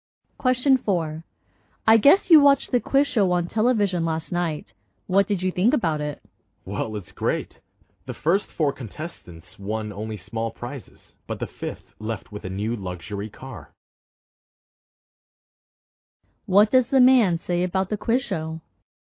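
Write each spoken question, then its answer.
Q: What does the man say about the quiz show?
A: It was great; the fifth contestant won a new luxury car.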